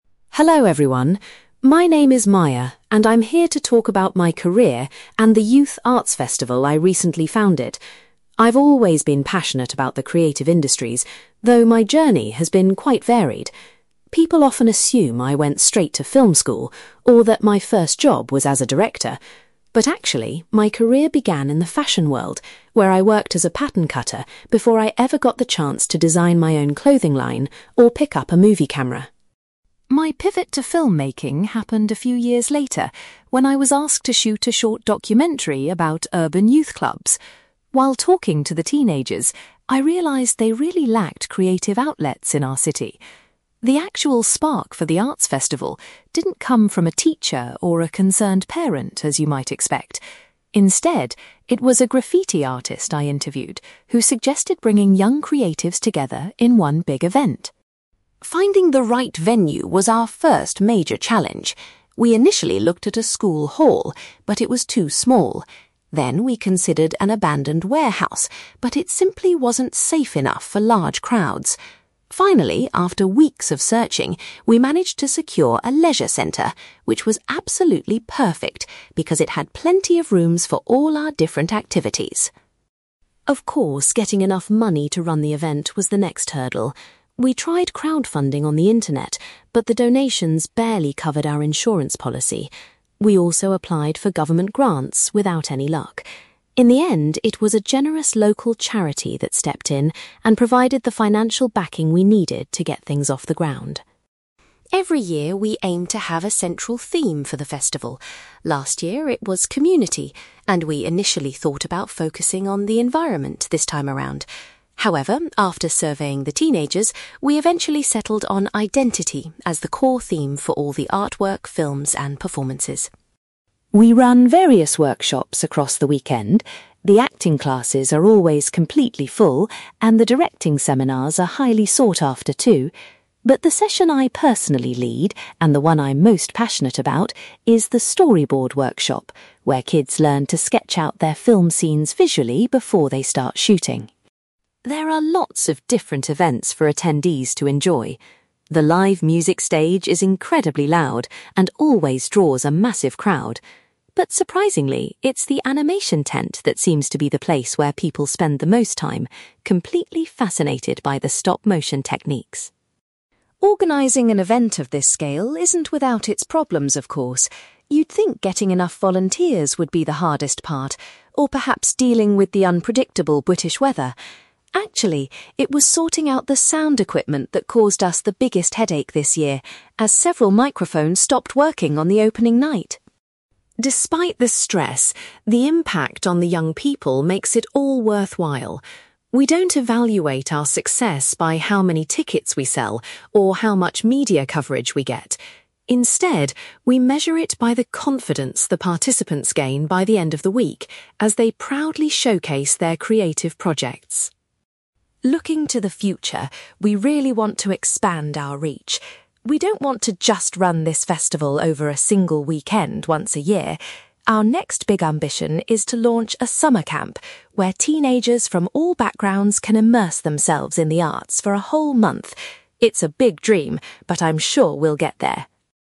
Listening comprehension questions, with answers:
You will hear a woman called Maya giving a talk about her career and a youth arts festival she organizes. For questions 9-18, complete the sentences with a word or short phrase.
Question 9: Maya's initial job in the creative industries was working as a (9)........................... .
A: pattern cutter

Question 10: The idea for the arts festival was given to Maya by a (10)........................... she was filming.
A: graffiti artist

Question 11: Maya was relieved when a (11)........................... was chosen as the location for the event.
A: leisure centre

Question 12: The festival was ultimately funded by a (12)........................... after other attempts failed.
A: local charity

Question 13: The participants decided that the theme for this year's festival should be (13)........................... .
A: identity

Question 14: Maya takes charge of a (14)........................... workshop to teach young people how to plan their films.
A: storyboard

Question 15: Maya notes that the (15)........................... is the area where festival visitors linger the longest.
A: animation tent

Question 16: The most significant problem the organisers faced this year was related to the (16)........................... .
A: sound equipment

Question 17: Maya judges the success of the festival by the increase in (17)........................... shown by the young people.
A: confidence

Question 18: Maya hopes to set up a (18)........................... to give teenagers a longer experience of the arts.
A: summer camp

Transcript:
Maya : Hello everyone, my name is Maya, and I'm here to talk about my career and the youth arts festival I recently founded. I've always been passionate about the creative industries, though my journey has been quite varied. People often assume I went straight to film school, or that my first job was as a director. But actually, my career began in the fashion world, where I worked as a pattern cutter before I ever got the chance to design my own clothing line or pick up a movie camera.
My pivot to filmmaking happened a few years later when I was asked to shoot a short documentary about urban youth clubs. While talking to the teenagers, I realised they really lacked creative outlets in our city. The actual spark for the arts festival didn't come from a teacher or a concerned parent, as you might expect. Instead, it was a graffiti artist I interviewed who suggested bringing young creatives together in one big event.
Finding the right venue was our first major challenge. We initially looked at a school hall, but it was too small. Then we considered an abandoned warehouse, but it simply wasn't safe enough for large crowds. Finally, after weeks of searching, we managed to secure a leisure centre, which was absolutely perfect because it had plenty of rooms for all our different activities.
Of course, getting enough money to run the event was the next hurdle. We tried crowdfunding on the internet, but the donations barely covered our insurance policy. We also applied for government grants without any luck. In the end, it was a generous local charity that stepped in and provided the financial backing we needed to get things off the ground.
Every year we aim to have a central theme for the festival. Last year it was 'community', and we initially thought about focusing on 'the environment' this time around. However, after surveying the teenagers, we eventually settled on identity as the core theme for all the artwork, films, and performances.
We run various workshops across the weekend. The acting classes are always completely full, and the directing seminars are highly sought after too. But the session I personally lead, and the one I'm most passionate about, is the storyboard workshop, where kids learn to sketch out their film scenes visually before they start shooting.
There are lots of different events for attendees to enjoy. The live music stage is incredibly loud and always draws a massive crowd. But surprisingly, it's the animation tent that seems to be the place where people spend the most time, completely fascinated by the stop-motion techniques.
Organising an event of this scale isn't without its problems, of course. You'd think getting enough volunteers would be the hardest part, or perhaps dealing with the unpredictable British weather. Actually, it was sorting out the sound equipment that caused us the biggest headache this year, as several microphones stopped working on the opening night!
Despite the stress, the impact on the young people makes it all worthwhile. We don't evaluate our success by how many tickets we sell or how much media coverage we get. Instead, we measure it by the confidence the participants gain by the end of the week, as they proudly showcase their creative projects.
Looking to the future, we really want to expand our reach. We don't want to just run this festival over a single weekend once a year. Our next big ambition is to launch a summer camp, where teenagers from all backgrounds can immerse themselves in the arts for a whole month. It's a big dream, but I'm sure we'll get there!

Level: B2